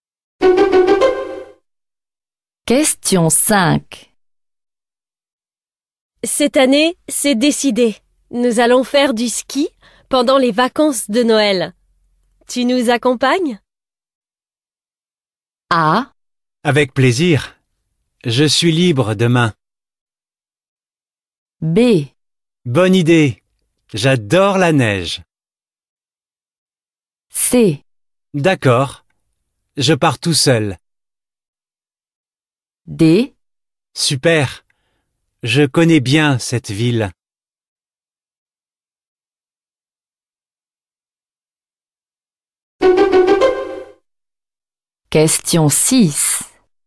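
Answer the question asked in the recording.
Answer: Bonne idée. J'adore la neige.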